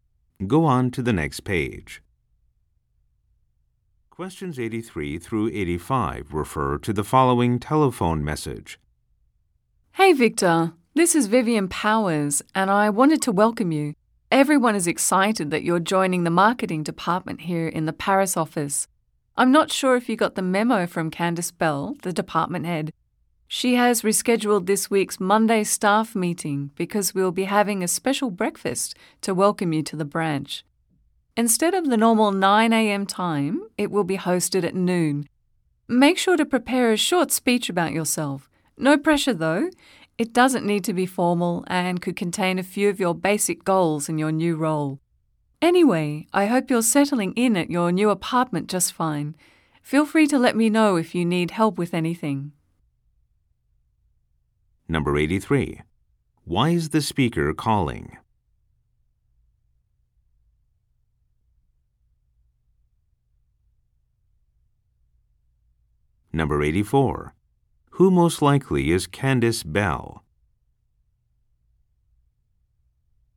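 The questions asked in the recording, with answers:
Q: Why is the speaker calling?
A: To welcome Victor and tell him about the rescheduled meeting

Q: Who most likely is Candice Bell?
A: The head of the marketing department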